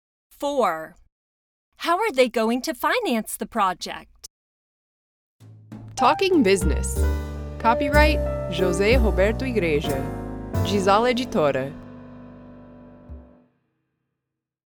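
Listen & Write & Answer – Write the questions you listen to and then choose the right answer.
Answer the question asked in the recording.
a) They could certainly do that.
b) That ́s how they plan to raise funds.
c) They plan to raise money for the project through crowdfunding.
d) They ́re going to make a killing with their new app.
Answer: c) They plan to raise money for the project through crowdfunding.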